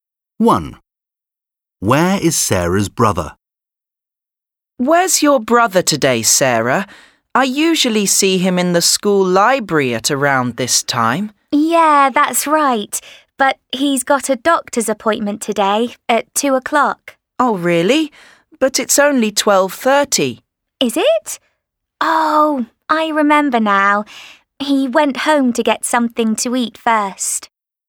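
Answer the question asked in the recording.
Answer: At home (getting something to eat)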